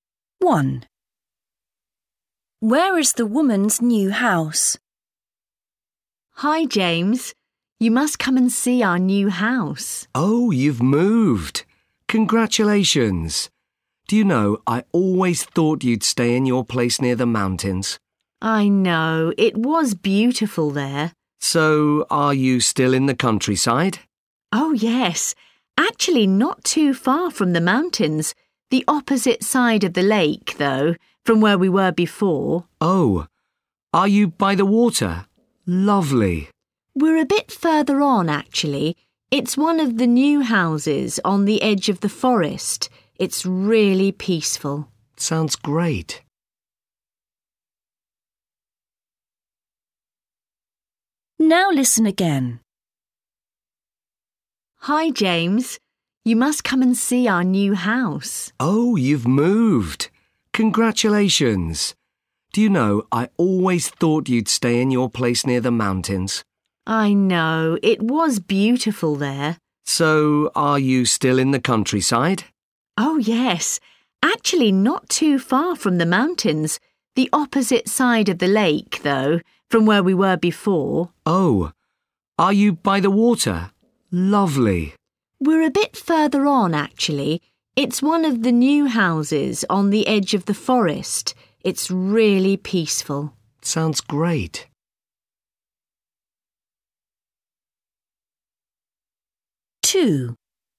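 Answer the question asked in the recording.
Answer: On the edge of the forest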